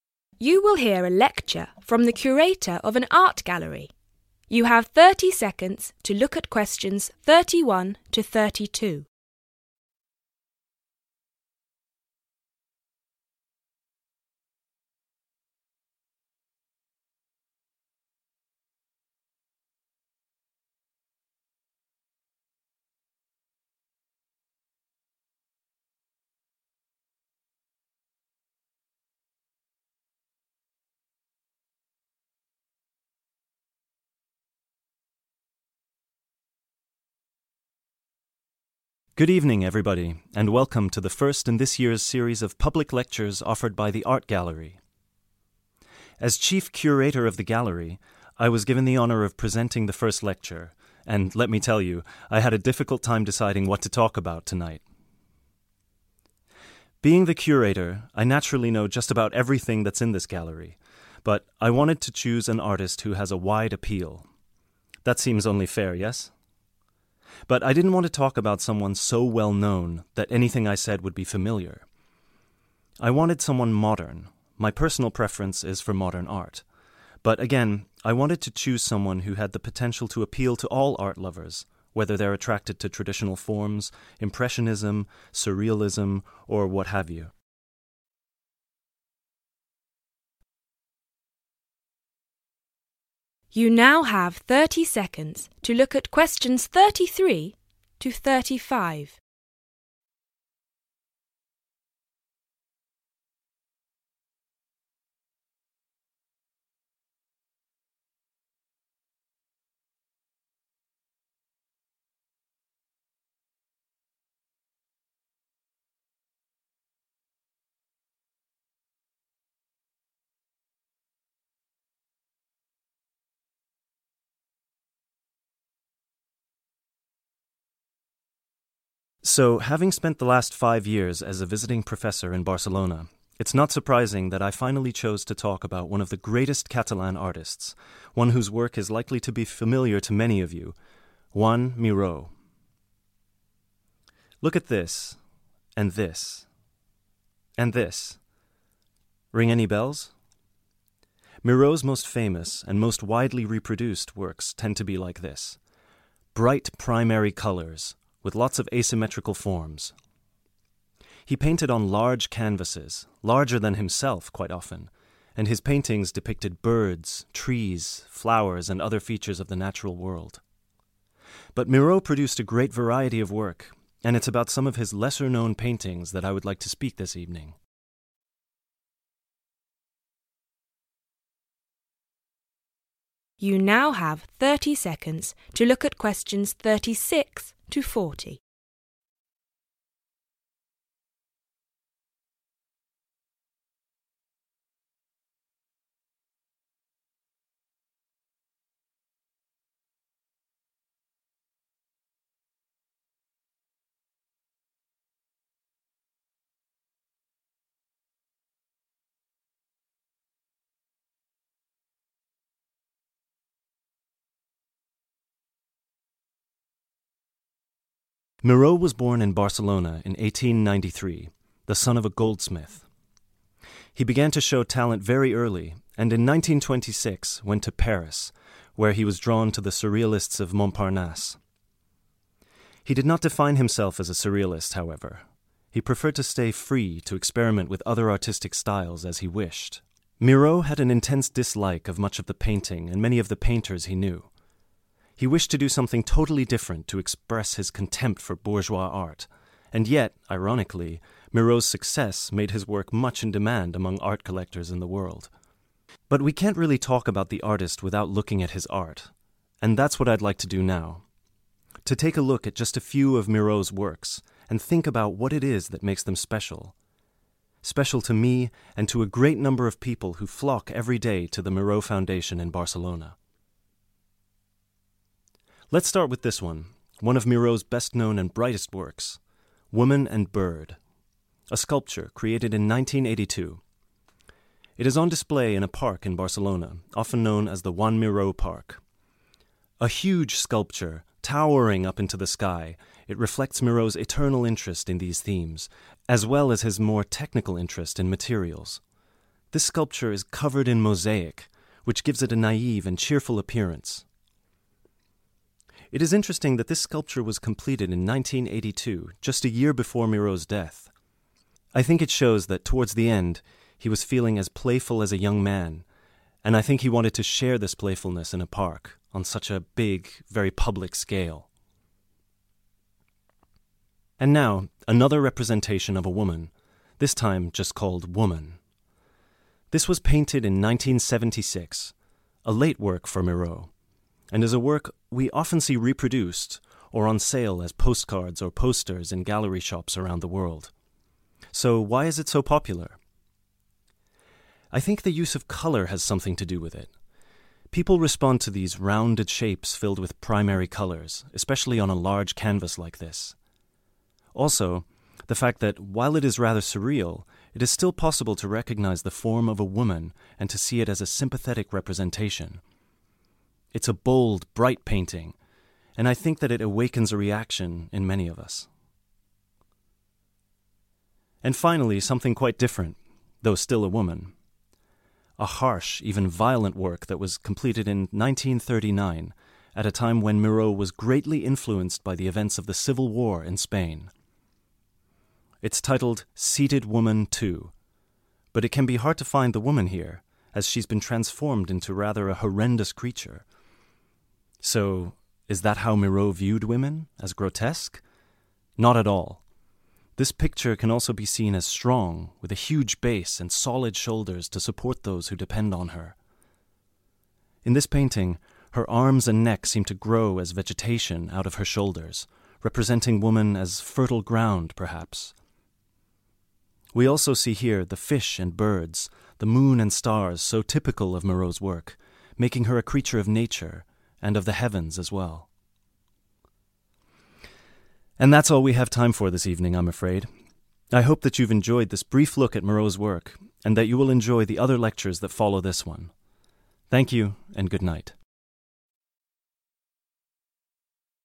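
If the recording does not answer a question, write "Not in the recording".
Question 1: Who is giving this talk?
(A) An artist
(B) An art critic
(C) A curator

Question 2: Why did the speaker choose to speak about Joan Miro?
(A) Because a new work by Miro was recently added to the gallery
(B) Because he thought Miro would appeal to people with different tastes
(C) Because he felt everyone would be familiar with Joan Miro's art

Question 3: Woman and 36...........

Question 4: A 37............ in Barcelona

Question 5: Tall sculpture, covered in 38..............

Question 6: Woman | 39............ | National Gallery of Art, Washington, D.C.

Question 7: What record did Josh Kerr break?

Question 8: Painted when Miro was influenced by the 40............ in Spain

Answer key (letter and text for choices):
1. (C) A curator
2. (B) Because he thought Miro would appeal to people with different tastes
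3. Bird
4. park
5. mosaic
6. 1976
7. Not in the recording
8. Civil War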